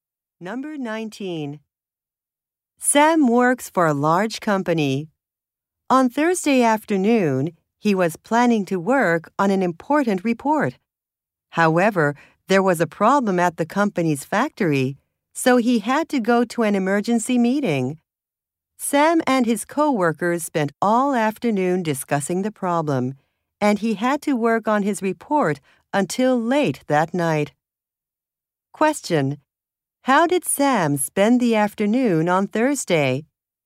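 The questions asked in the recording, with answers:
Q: How did Sam spend the afternoon on Thursday?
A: In an emergency meeting about a problem at the factory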